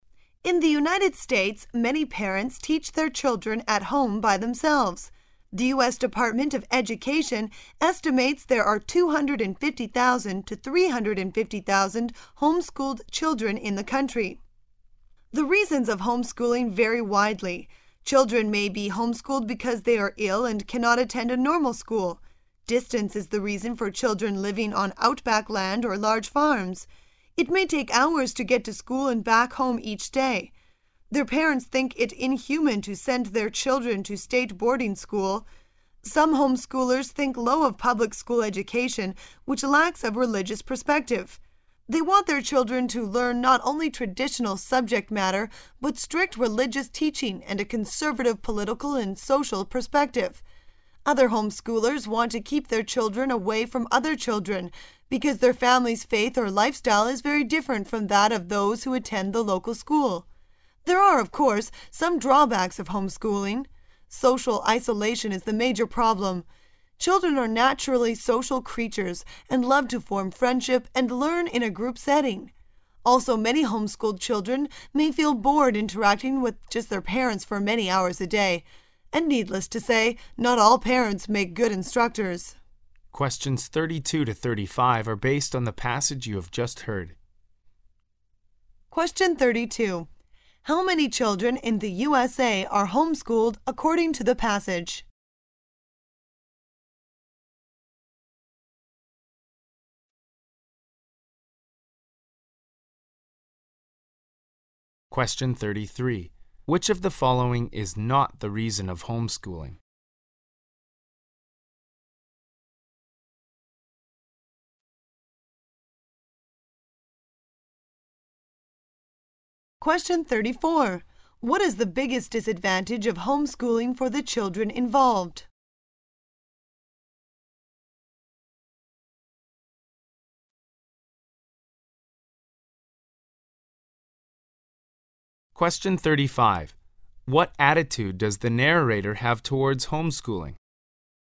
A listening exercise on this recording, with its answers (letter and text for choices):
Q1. Which of the following is NOT the reason of home-schooling?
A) Poor health condition of the children.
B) Poor quality of village schools.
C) Religious differences.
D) Different lifestyle or faith.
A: B) Poor quality of village schools.

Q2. What is the biggest disadvantage of home-schooling for the children involved?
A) They lack opportunities to interact with children of their age.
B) Their parents are not qualified instructors.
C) They cannot win honor in such an environment.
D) They make no genuine friends.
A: A) They lack opportunities to interact with children of their age.

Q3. What attitude does the narrator have towards home-schooling?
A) Positive.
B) Negative.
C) Neutral.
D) Indifferent.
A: C) Neutral.

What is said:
[解析] 32-35 In the United States many parents teach their children at home by themselves. The U. S. Department of Education estimates there are 250,000 to 350,000 home-schooled children in the country. The reasons of home-schooling vary widely. Children may be home-schooled because they are ill and cannot attend a normal school. Distance is the reason for children living on outback land or large farms. It may take hours to get to school and back home each day. Their parents think it inhumane to send their children to state boarding school. Some home schoolers think low of public school education which lacks of religious perspective. They want their children to learn not only traditional subject matter but strict religious teaching and a conservative political and social perspective. Other home-schoolers want to keep their children away from other children, because their family' s faith or lifestyle is very different from that of those who attend the local school. There are, of course, some drawbacks of home-schooling. Social isolation is the major problem. Children are naturally social creatures and love to form friendship and learn in a group setting. Also, many home-schooled children may feel bored interacting with just their parents for many hours a day. And needless to say, not ail parents make good instructors. How many children in the U. S.